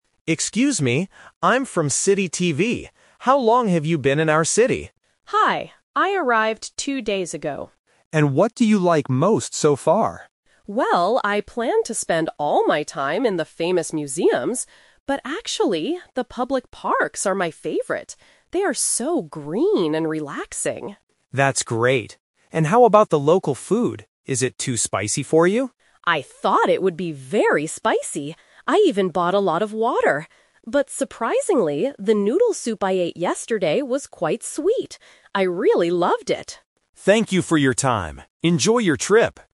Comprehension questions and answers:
Listen to a street interview between a TV reporter and a tourist. Choose the correct answer (A, B, or C) for each question.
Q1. What does the tourist like most about the city?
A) The famous museums.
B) The public parks.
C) The street food.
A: B) The public parks.

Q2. Why did the tourist buy a lot of water?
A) Because she walked in the park all day.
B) Because the weather was very hot.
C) Because she expected the food to be spicy.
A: C) Because she expected the food to be spicy.

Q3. What does the tourist say about the noodle soup she ate?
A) It was very spicy.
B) It was quite sweet.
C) It was a bit salty.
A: B) It was quite sweet.

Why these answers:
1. The tourist clearly states, "But actually, the public parks are my favorite." Option A is the trap: she "planned" to visit the museums, but they are not her favorite thing. Option C is not mentioned as her favorite.
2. The tourist says, "I thought it would be very spicy! I even bought a lot of water." This means she bought water because of her expectation about the food. Options A and B are plausible reasons to buy water on a trip, but they are not mentioned in the audio.
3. The tourist describes the noodle soup by saying, "the noodle soup I ate yesterday was quite sweet." Option A is the trap: the reporter asks if the food is spicy, and the tourist "thought" it would be, but the actual soup was sweet. Option C is never mentioned.

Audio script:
Reporter: Excuse me! I'm from City TV. How long have you been in our city?
Tourist: Hi. I arrived two days ago.
Reporter: And what do you like most so far?
Tourist: Well, I planned to spend all my time in the famous museums. But actually, the public parks are my favorite. They are so green and relaxing.
Reporter: That's great! And how about the local food? Is it too spicy for you?
Tourist: I thought it would be very spicy! I even bought a lot of water. But surprisingly, the noodle soup I ate yesterday was quite sweet. I really loved it.

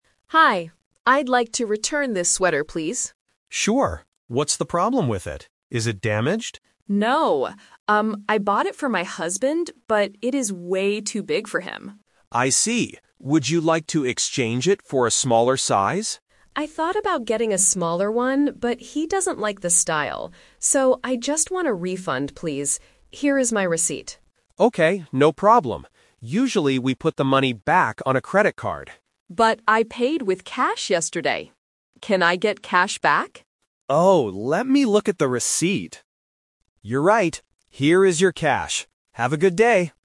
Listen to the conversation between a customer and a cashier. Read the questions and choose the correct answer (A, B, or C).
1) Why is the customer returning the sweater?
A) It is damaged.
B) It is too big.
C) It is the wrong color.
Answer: B) It is too big.

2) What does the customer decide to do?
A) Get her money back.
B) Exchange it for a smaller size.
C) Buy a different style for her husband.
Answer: A) Get her money back.

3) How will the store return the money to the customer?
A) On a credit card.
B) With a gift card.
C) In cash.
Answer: C) In cash.

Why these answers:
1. The customer explicitly says, "...it is way too big for him." Why the trap is wrong: Option (A) is a trap. The cashier asks, "Is it damaged?" but the customer replies "No." Option (C) is a plausible reason but is not mentioned in the audio.
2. The customer says, "I just want a refund, please." A refund means getting your money back. Why the trap is wrong: Option (B) is the "Twist" trap. The customer says, "I thought about getting a smaller one, but..." she decided not to because her husband doesn't like the style.
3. The customer reminds the cashier, "I paid with cash yesterday," and the cashier says, "Here is your cash." Why the trap is wrong: Option (A) is a strong trap. The cashier mentions that they usually put the money on a credit card, but in this specific situation, the customer paid with cash.

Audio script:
Customer: Hi. I'd like to return this sweater, please.
Cashier: Sure. What's the problem with it? Is it damaged?
Customer: No. Um, I bought it for my husband, but it is way too big for him.
Cashier: I see. Would you like to exchange it for a smaller size?
Customer: I thought about getting a smaller one, but he doesn't like the style. So, I just want a refund, please. Here is my receipt.
Cashier: Okay, no problem. Usually, we put the money back on a credit card.
Customer: But I paid with cash yesterday. Can I get cash back?
Cashier: Oh, let me look at the receipt... You're right. Here is your cash. Have a good day!

